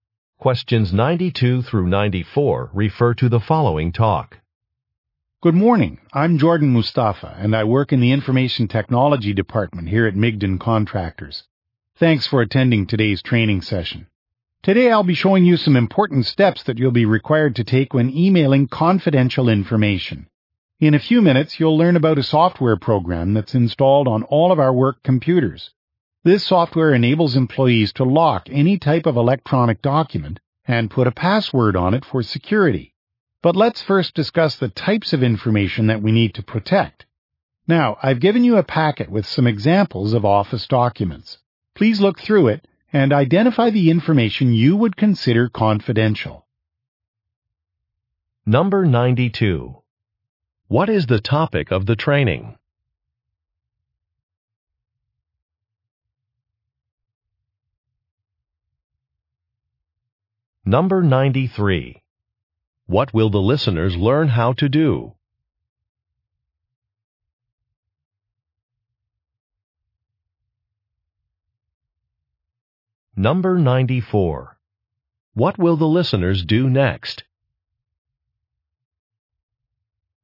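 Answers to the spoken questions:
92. Emailing confidential information securely
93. Lock documents with a password using software
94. Look through a packet of sample documents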